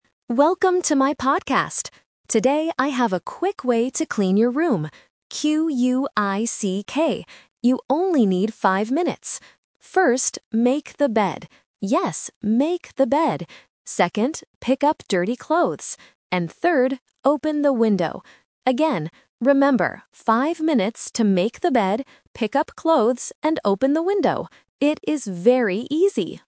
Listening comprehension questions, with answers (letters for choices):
Listen to the podcast and choose the correct answer (A, B, or C).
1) How long does it take to clean the room?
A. 5 minutes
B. 15 minutes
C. 50 minutes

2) What word does the podcaster spell?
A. C-L-E-A-N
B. Q-U-I-C-K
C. E-A-S-Y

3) What is the first step?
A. Pick up clothes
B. Open the window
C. Make the bed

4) What is the final step?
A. Open the window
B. Make the bed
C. Buy a podcast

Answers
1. A
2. B
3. C
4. A

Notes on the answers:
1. The podcaster says, "You only need 5 minutes" and repeats "5 minutes" later in the audio. Why the trap is wrong: 50 (C) is a sound trap because "five" and "fifty" can be confused at A1 level. 15 (B) is not mentioned.
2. The podcaster says "quick way" and spells the word: "Q-U-I-C-K". Why the trap is wrong: Clean (A) and Easy (C) are adjectives used in the podcast, but the speaker does not spell them.
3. The speaker says, "First, make the bed." Why the trap is wrong: "Pick up clothes" (A) is the second step. "Open the window" (B) is the third step.
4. The third and final step mentioned is to "open the window." Why the trap is wrong: "Make the bed" (B) is the first step. "Buy a podcast" (C) is not mentioned.

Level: A1